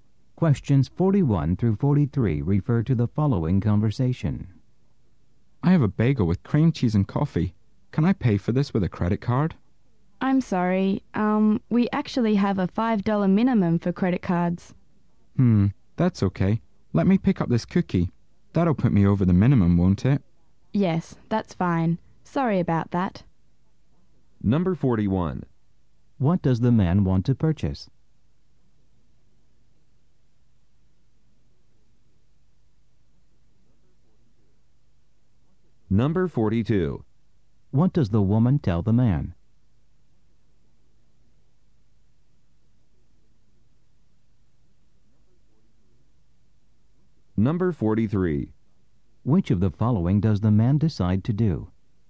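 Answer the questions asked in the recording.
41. A bagel with cream cheese and coffee
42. There is a $5 minimum for credit cards
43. Buy a cookie too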